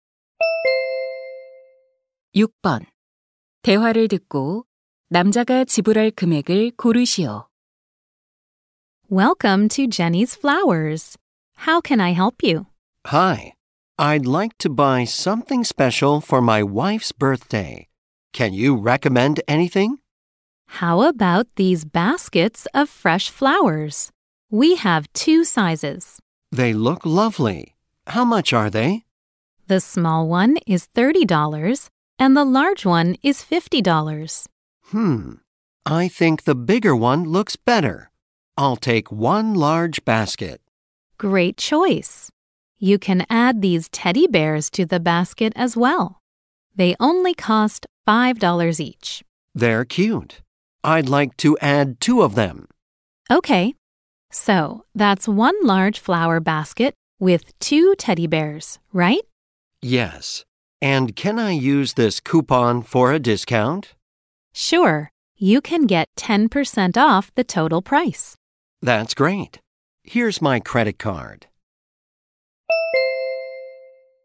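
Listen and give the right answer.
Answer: $54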